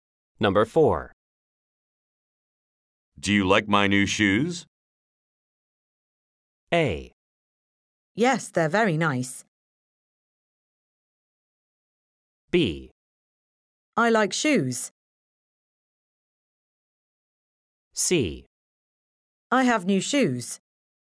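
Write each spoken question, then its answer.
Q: Do you like my new shoes?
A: A: Yes, they're very nice.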